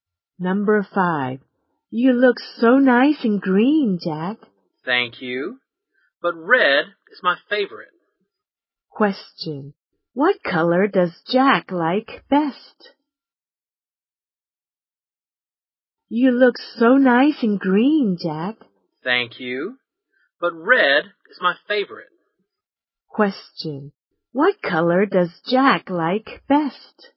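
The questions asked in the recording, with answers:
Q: What color does Jack like best?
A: Red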